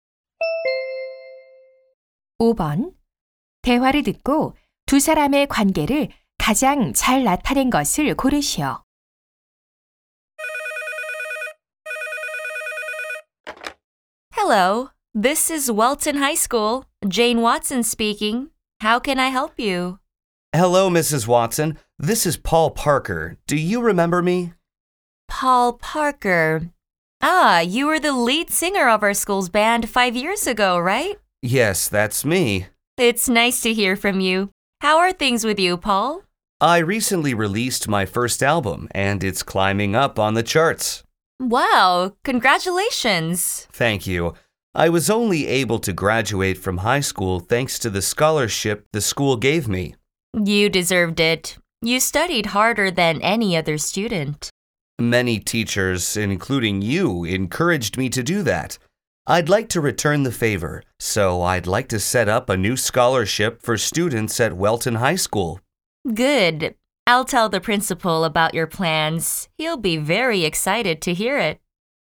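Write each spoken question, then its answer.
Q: 대화를 듣고 두 사람의 관계를 가장 잘 나타낸 것을 고르시오.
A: 교사 - 졸업생(가수)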